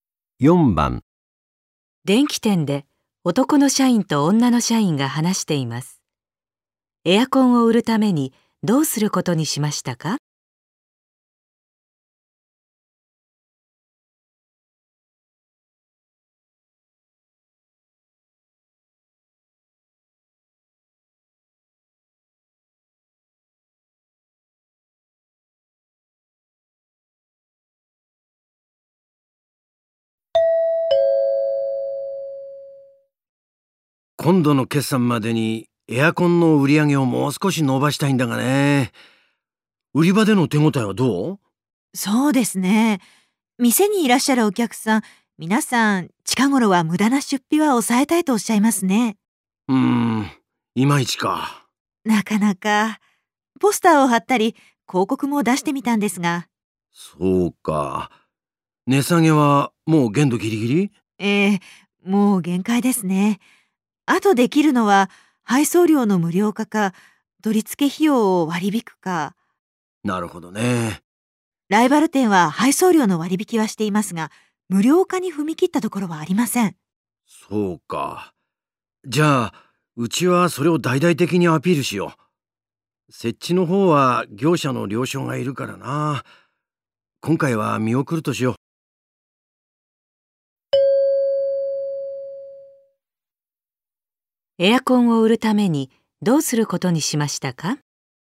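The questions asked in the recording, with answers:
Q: エアコンを売るためにどうすることにしましたか?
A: 配送料を無料にして大々的にアピールする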